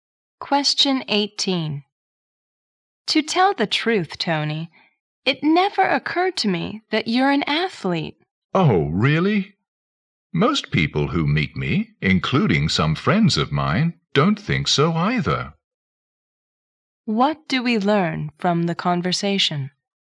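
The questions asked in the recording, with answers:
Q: What do we learn from the conversation?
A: Tony doesn't look like an athlete.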